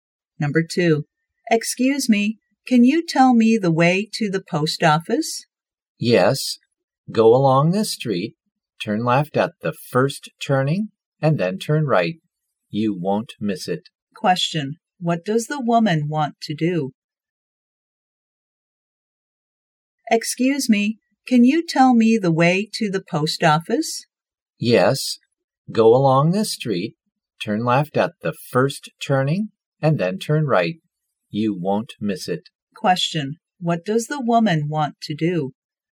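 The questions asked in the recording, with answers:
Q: what does the woman want to do?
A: Go to the post office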